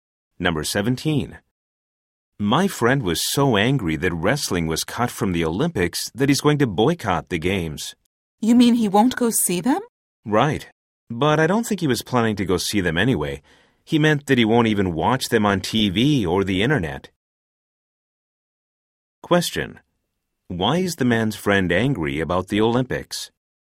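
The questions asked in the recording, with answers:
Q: Why is the man's friend angry about the Olympics?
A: Wrestling was cut from the Olympics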